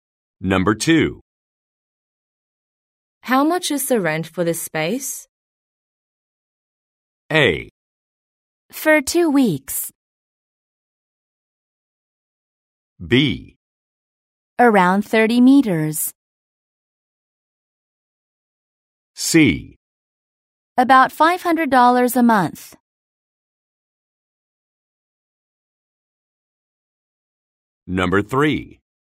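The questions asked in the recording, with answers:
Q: How much is the rent for this space?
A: C: About $500 a month.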